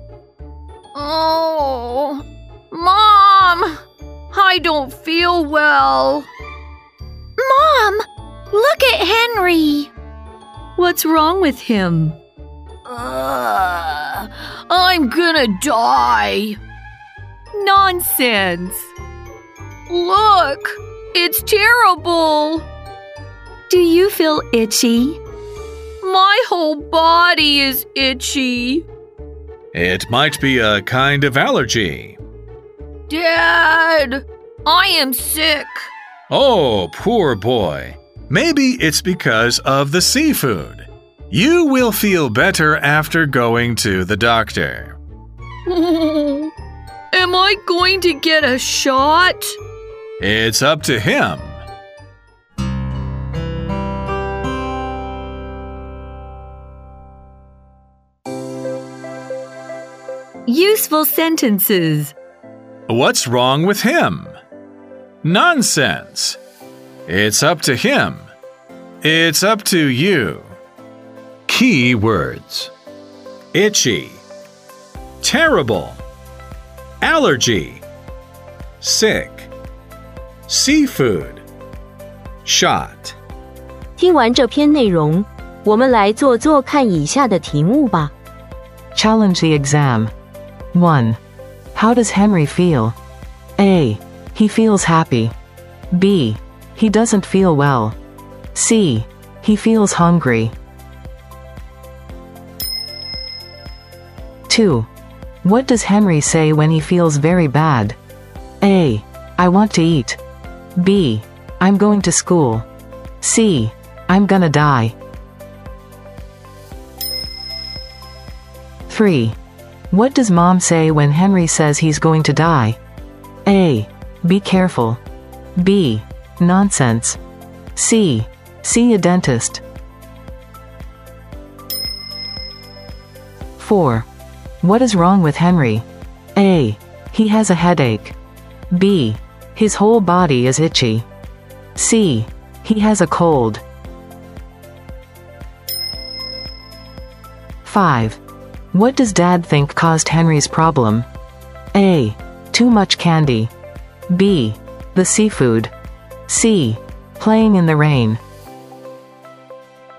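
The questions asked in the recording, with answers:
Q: How does Henry feel?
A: B: He doesn't feel well.

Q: What does Henry say when he feels very bad?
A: C: I'm gonna die.

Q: What does Mom say when Henry says he's going to die?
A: B: Nonsense.

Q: What is wrong with Henry?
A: B: His whole body is itchy.

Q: What does Dad think caused Henry's problem?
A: B: The seafood.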